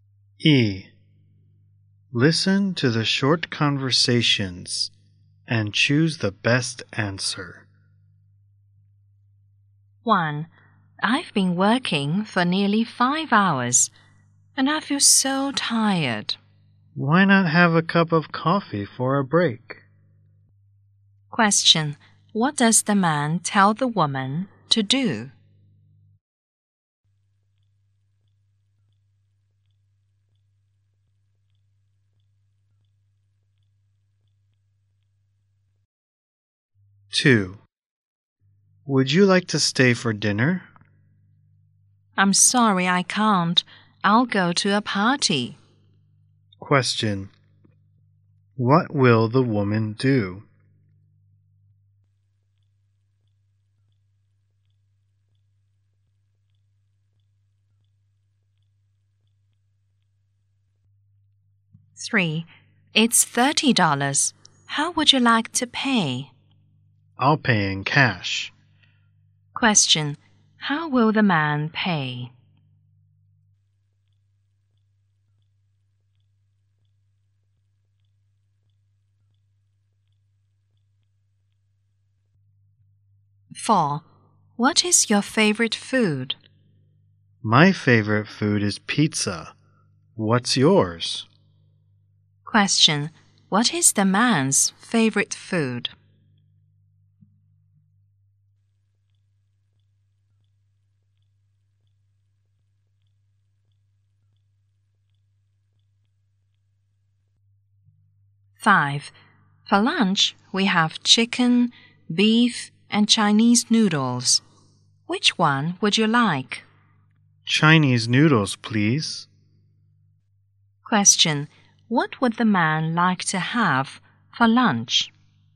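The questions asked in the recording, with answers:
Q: What does the man tell the woman to do?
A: Have a cup of coffee for a break

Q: What will the woman do?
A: Go to a party

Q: How will the man pay?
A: In cash

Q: What would the man like to have for lunch?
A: Chinese noodles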